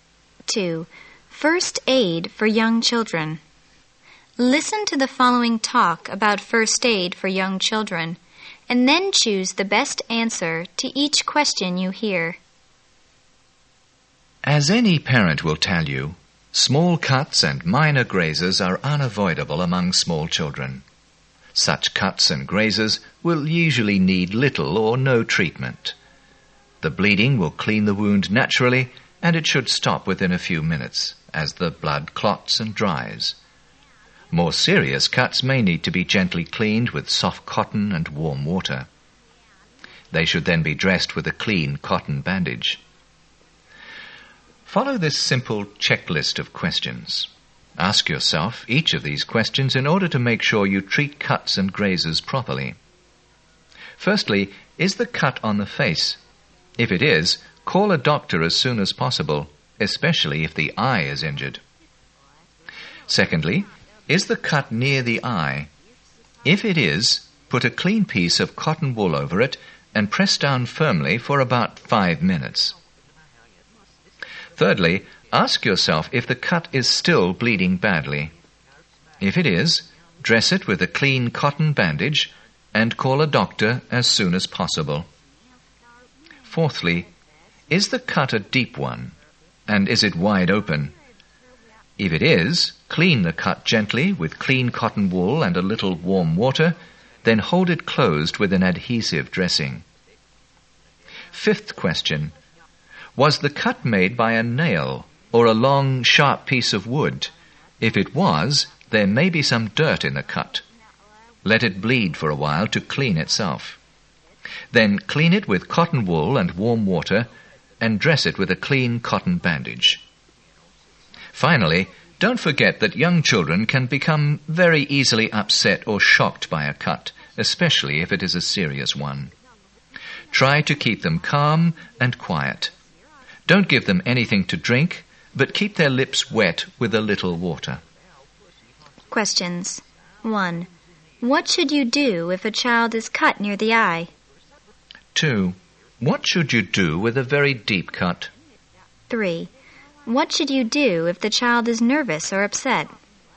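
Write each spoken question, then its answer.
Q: What should you do if a child is cut near the eye?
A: Put a clean piece of cotton wool over it and press down firmly for about 5 minutes.

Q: What should you do with a very deep cut?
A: Clean it gently with cotton wool and warm water, then hold it closed with an adhesive dressing.

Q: What should you do if the child is nervous or upset?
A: Keep the child calm and quiet; give no drinks, but keep the lips wet.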